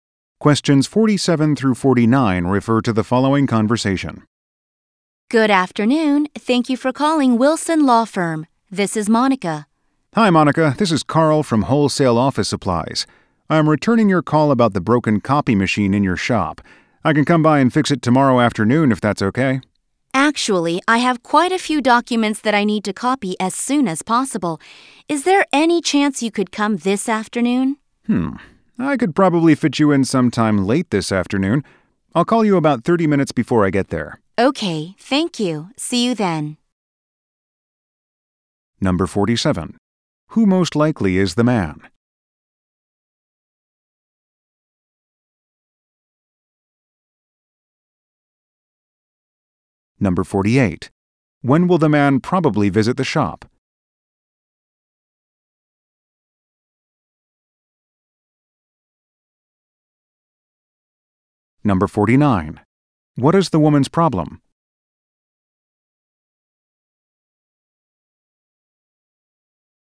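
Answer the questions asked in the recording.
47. A copy machine repairman
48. Late this afternoon
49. Her copy machine is broken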